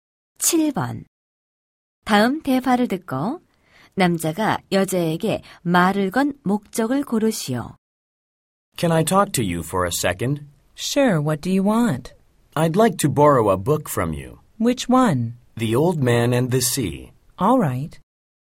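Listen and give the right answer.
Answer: 책을 빌리려고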